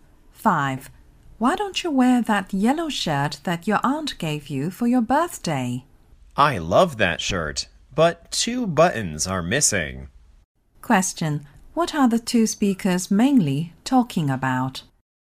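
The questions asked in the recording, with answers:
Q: What are the two speakers mainly talking about?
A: A yellow shirt with two missing buttons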